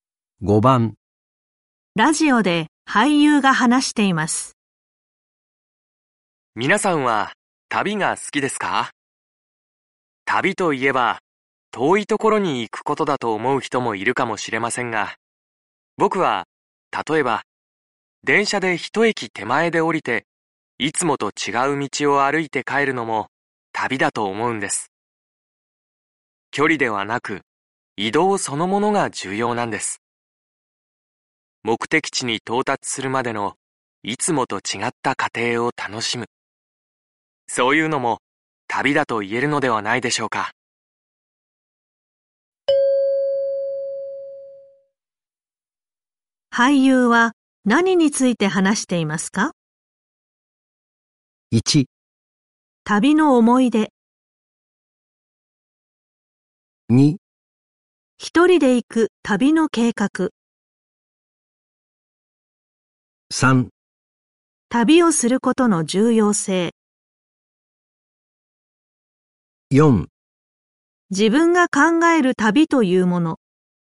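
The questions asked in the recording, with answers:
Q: 俳優は何について話していますか?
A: 4: 自分が考える旅というもの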